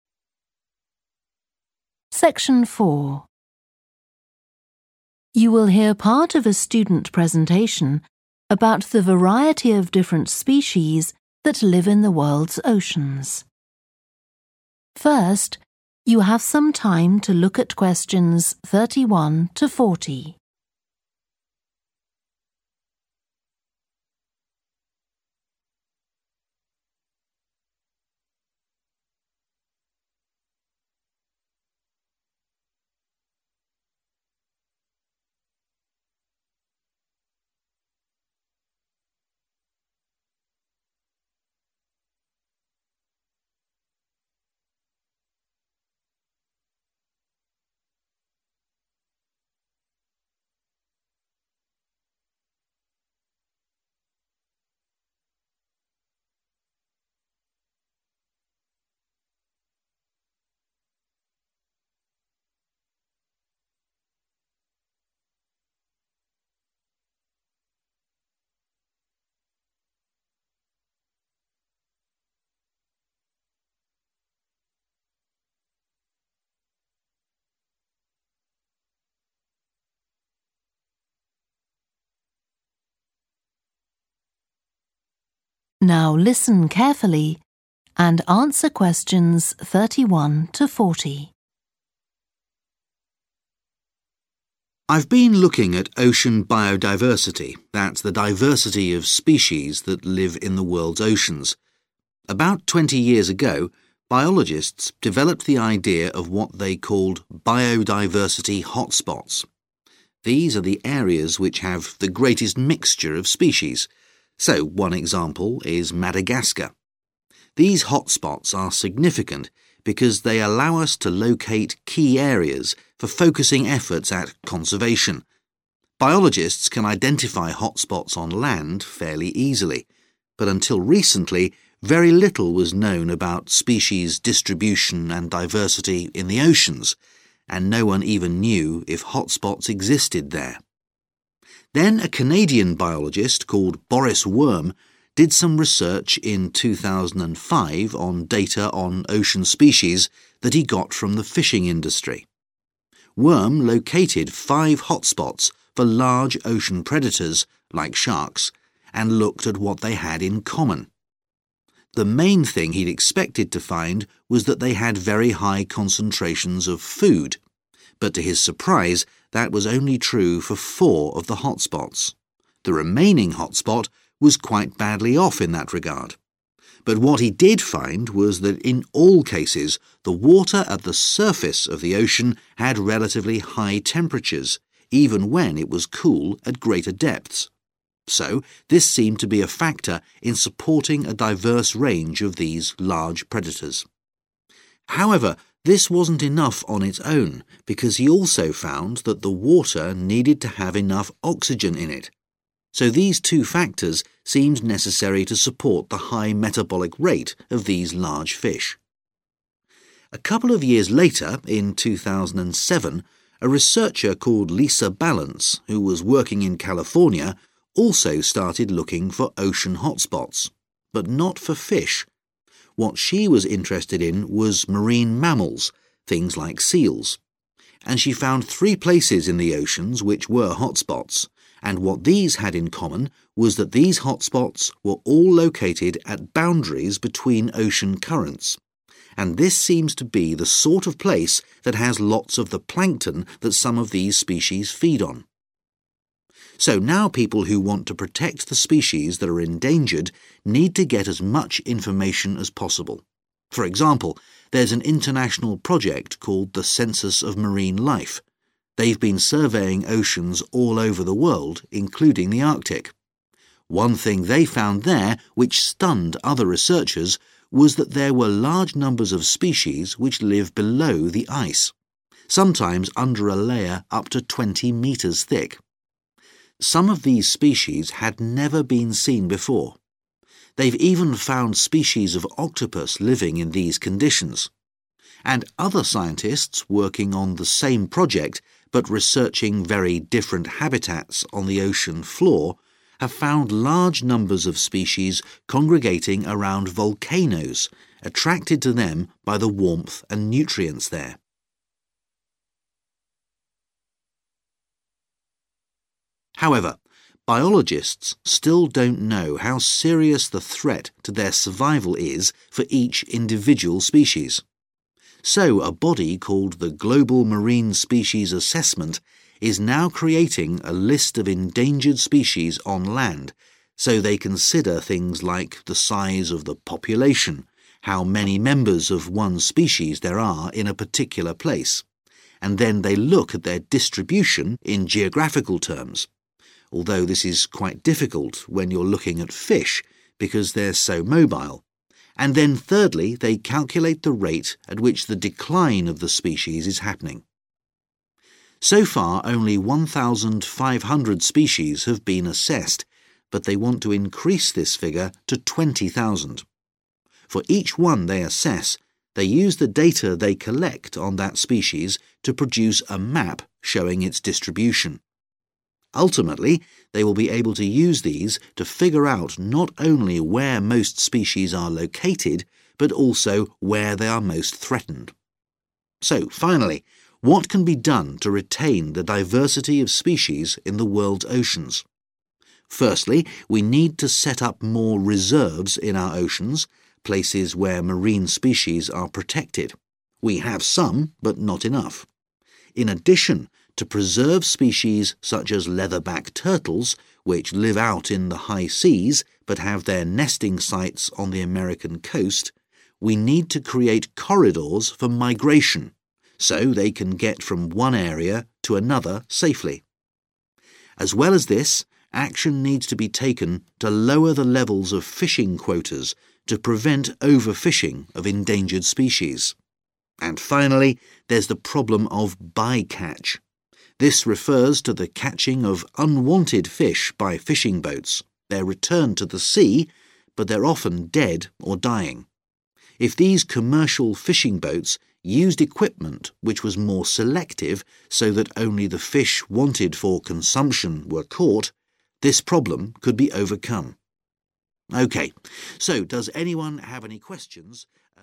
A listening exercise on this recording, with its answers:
Complete the notes below. Write ONE WORD ONLY for each answer.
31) important for locating targets for 31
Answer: conservation

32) – were not always rich in 32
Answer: food / foods

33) – had higher temperatures at the 33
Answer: surface

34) – had sufficient 34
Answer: oxygen / O2

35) looked for hotspots for marine 35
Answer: mammals

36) – under the 36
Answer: ice

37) – rate of 37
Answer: decline / declining / decrease

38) Aim: to assess 20,000 species and make a distribution 38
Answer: map

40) catch fish only for the purpose of 40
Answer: consumption

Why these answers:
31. The transcript is saying that these hotspots help us find important places where we need to work towards protecting nature. Answer Explanation: The answer refers to the action of protecting and preserving something, in this case, the biodiversity of the oceans. Reason For Correctness: The correct answer is 'conservation' because it fits perfectly with the context of the excerpt, which emphasizes the significance of hotspots for focusing efforts on protecting ocean biodiversity.
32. The transcript talks about how the researcher expected to find high amounts of food in the hotspots, but he was surprised to discover that only four of them had high concentrations of food. The rest of the hotspots were lacking in food. Answer Explanation: The answer 'food' refers to what the researcher was looking for in the hotspots - high concentrations of food. Reason For Correctness: The correct answer is 'food' because it directly relates to the researcher's surprise that only a few hotspots had ample food concentrations, while the others were lacking in this aspect. The answer fits perfectly in the context of the excerpt mentioning the differences in food availability among the studied hotspots.
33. The transcript mentions that even though the deeper parts of the ocean may be cool, the water closer to the surface has higher temperatures. Answer Explanation: The answer refers to the 'surface' of the ocean, which means the top layer or the part of the ocean that is directly exposed to the air above. Reason For Correctness: The correct answer matches with the information provided in the excerpt where it is stated that the water at the surface of the ocean had relatively high temperatures. This shows that the answer 'surface' is correct in this context.
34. The transcript is saying that Boris Worm found that ocean hotspots had sufficient oxygen in the water. Answer Explanation: The answer is oxygen, which is the essential element needed in the water. Reason For Correctness: The correct answer is oxygen because the transcript clearly states that the water needed to have enough oxygen in it, which is necessary for ocean hotspots to exist.
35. The transcript talks about what Lisa Ballance was interested in. She focused on marine mammals, such as seals. Answer Explanation: The answer 'mammals' refers to animals like seals that live in the ocean. Reason For Correctness: The correct answer is 'mammals' because the excerpt specifically mentions 'marine mammals' like seals, indicating that Lisa Ballance was studying and interested in this specific type of ocean animals.
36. The transcript talks about researchers discovering a surprising number of species that live beneath the ice. Answer Explanation: The answer refers to the word 'ice'. Reason For Correctness: The correct answer matches the word mentioned in the excerpt, which is 'ice'. It reflects the specific habitat mentioned where researchers found a large number of species, which is below the ice. This word directly corresponds to the information provided in the original text.
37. The transcript talks about figuring out how quickly the number of species is decreasing. Answer Explanation: The answer 'decline' relates to a decrease or reduction in something. Reason For Correctness: The correct answer matches the context of the excerpt as it accurately reflects the idea of a reduction happening in the species' population, which aligns with the concept of decline.
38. The transcript explains that when scientists study each ocean species, they gather information about it. They then use this information to create a visual representation, called a map, that shows where the species is found in the ocean. Answer Explanation: The answer 'map' refers to a picture or diagram that tells us where something is located. In this case, it's about finding where different ocean species live. Reason For Correctness: The correct answer is 'map' because the excerpt states that scientists produce a map showing the distribution of each species they assess, which means they are creating a visual guide to where each species lives.
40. The transcript talks about a solution to the problem of overfishing. It suggests that if fishing boats only catch the fish that are going to be eaten, the problem of overfishing can be solved. Answer Explanation: The answer 'consumption' refers to the purpose of catching fish for human consumption, meaning to eat them. Reason For Correctness: The correct answer is 'consumption' because it directly relates to the idea presented in the excerpt where catching fish only for the purpose of consumption is suggested as a solution to the problem of overfishing.

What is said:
I've been looking at ocean biodiversity, that's the diversity of species that live in the world's oceans. About 20 years ago biologists developed the idea of what they called 'biodiversity hotspots'. These are the areas which have the greatest mixture of species, so one example is Madagascar. These hotspots are significant because they allow us to locate key areas for focusing efforts at conservation. Biologists can identify hotspots on land, fairly easily, but until recently, very little was known about species distribution and diversity in the oceans, and no one even knew if hotspots existed there.
Then a Canadian biologist called Boris Worm did some research in 2005 on data on ocean species that he got from the fishing industry. Worm located five hotspots for large ocean predators like sharks, and looked at what they had in common. The main thing he'd expected to find was that they had very high concentrations of food, but to his surprise that was only true for four of the hotspots – the remaining hotspots was quite badly off in that regard. But what he did find was that in all cases, the water at the surface of the ocean had relatively high temperatures, even when it was cool at greater depths, so this seemed to be a factor in supporting a diverse range of these large predators. However, this wasn't enough on its own, because he also found that the water needed to have enough oxygen in it – so these two factors seemed necessary to support the high metabolic rate of these large fish.
A couple of years later, in 2007, a researcher called Lisa Balance, who was working in California, also started looking for ocean hotspots, but not for fish – what she was interested in was marine mammals, things like seals. And she found three places in the oceans which were hotspots, and what these had in common was that these hotspots were all located at boundaries between ocean currents, and this seems to be the sort of place that has lots of the plankton that some of these species feed on.
So now people who want to protect the species that are endangered need to get as much information as possible. For example, there's an international project called the Census of Marine Life. They've been surveying oceans all over the world, including the Arctic. One thing they found there which stunned other researchers was that there were large numbers of species which live below the ice – sometimes under a layer up to 20 metres thick. Some of these species had never been seen before. They've even found species of octopus living in these conditions. And other scientists working on the same project, but researching very different habitats on the ocean floor, have found large numbers of species congregating around volcanoes, attracted to them by the warmth and nutrients there.
However, biologists still don't know how serious the threat to their survival is for each individual species. So a body called the Global Marine Species Assessment is now creating a list of endangered species on land, so they consider things like the size of the population – how many members of one species there are in a particular place – and then they look at their distribution in geographical terms, although this is quite difficult when you're looking at fish, because they're so mobile, and then thirdly they calculate the rate at which the decline of the species is happening.
So far only 1,500 species have been assessed, but they want to increase this figure to 20,000. For each one they assess, they use the data they collect on that species to produce a map showing its distribution. Ultimately they will be able to use these to figure out not only where most species are located but also where they are most threatened.
So finally, what can be done to retain the diversity of species in the world's oceans? Firstly, we need to set up more reserves in our oceans, places where marine species are protected. We have some, but not enough. In addition, to preserve species such as leatherback turtles, which live out in the high seas but have their nesting sites on the American coast, we need to create corridors for migration, so they can get from one area to another safely. As well as this, action needs to be taken to lower the levels of fishing quotas to prevent overfishing of endangered species. And finally, there's the problem of 'by-catch'. This prefers to the catching of unwanted fish by fishing boats – they're returned to the sea, but they're often dead or dying. If these commercial fishing boats used equipment which was more selective, so that only the fish wanted for consumption were caught, this problem could be overcome.
OK. So does anyone have any ...